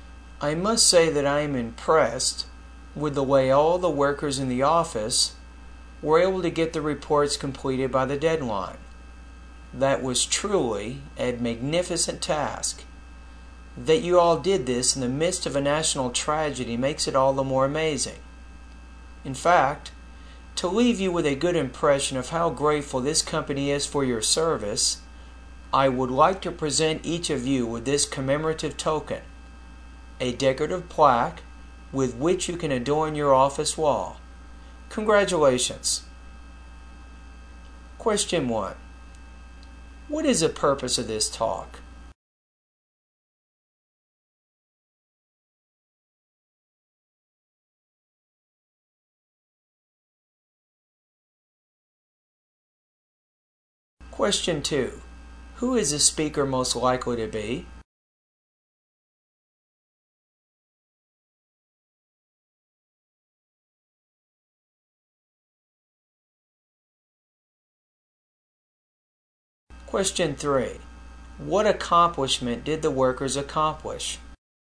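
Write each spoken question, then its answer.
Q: What is the purpose of this talk?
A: To thank and congratulate the workers and give them an award

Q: What accomplishment did the workers accomplish?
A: They completed the reports by the deadline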